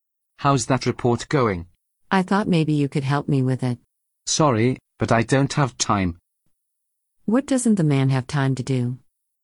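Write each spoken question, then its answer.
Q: What doesn't the man have time to do?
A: help with the report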